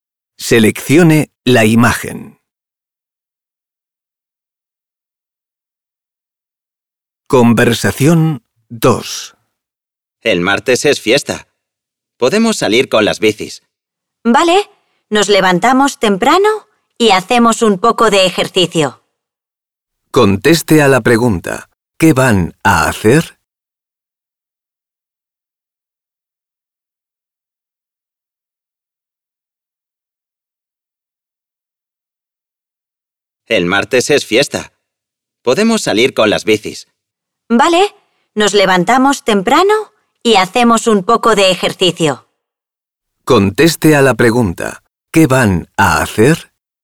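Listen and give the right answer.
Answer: salir en bici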